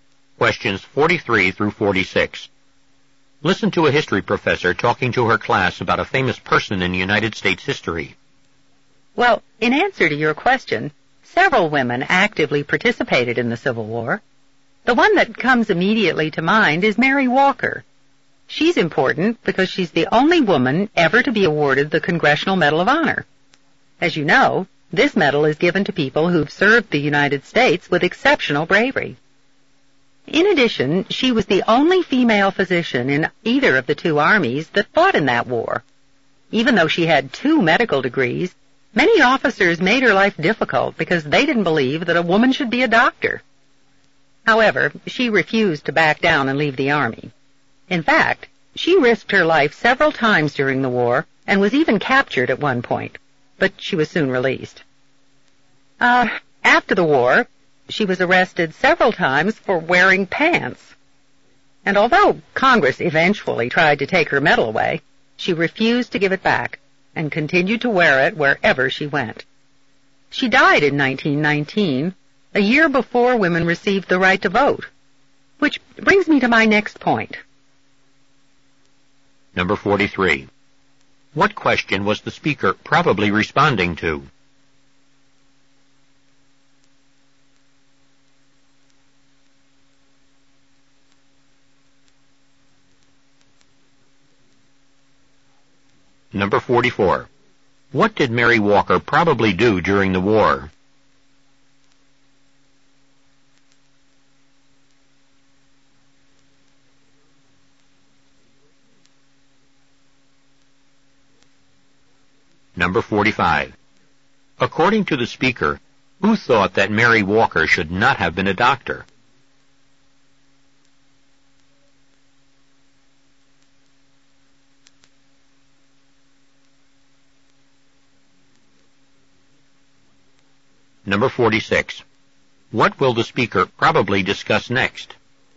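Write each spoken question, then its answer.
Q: What did Mary Walker probably do during the war?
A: She worked as a doctor (physician) in the army

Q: According to the speaker, who thought that Mary Walker should not have been a doctor?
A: Many army officers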